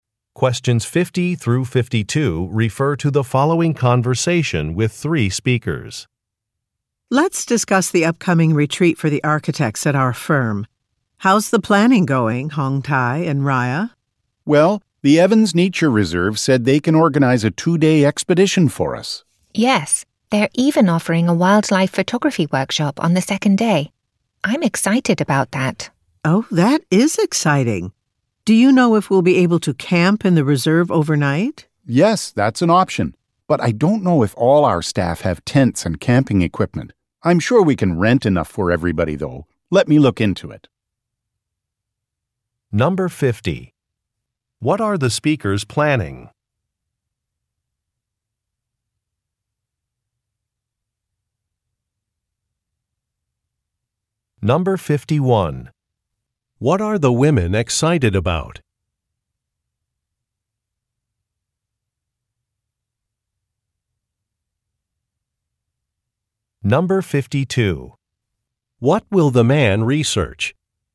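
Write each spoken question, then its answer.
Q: What are the speakers planning?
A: A two-day company retreat for architects at a nature reserve

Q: What are the women excited about?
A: A wildlife photography workshop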